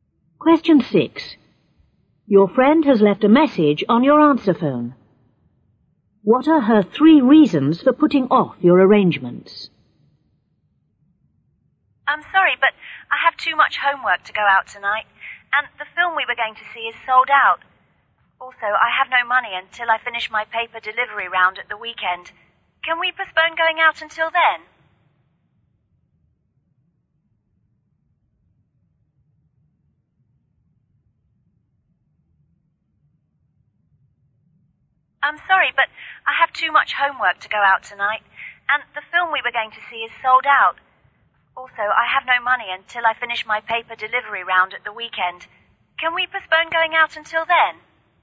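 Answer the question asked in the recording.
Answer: Too much homework, the film is sold out, no money until the weekend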